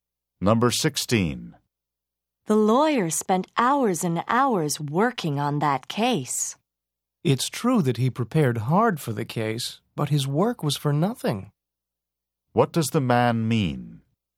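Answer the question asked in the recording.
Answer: The lawyer prepared hard but his work did no good.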